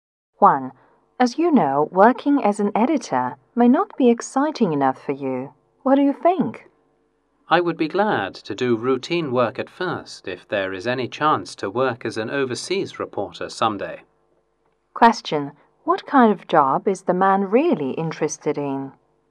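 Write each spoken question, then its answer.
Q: what kind of job is the man really interested in?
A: Working as an overseas reporter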